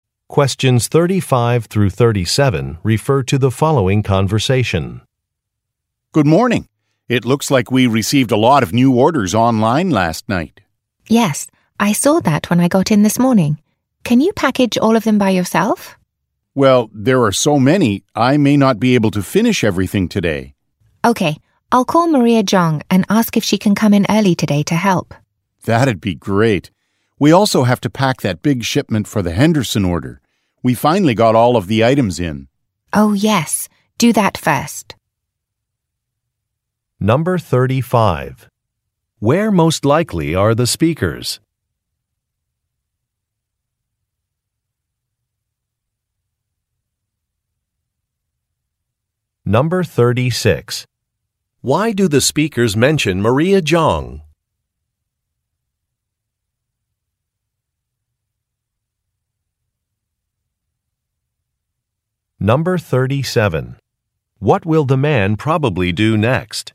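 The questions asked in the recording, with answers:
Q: Why do the speakers mention Maria Zhang?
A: She may come in early to help package the orders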